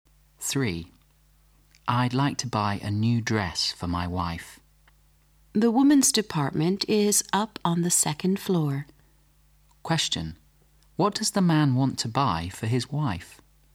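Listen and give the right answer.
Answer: A new dress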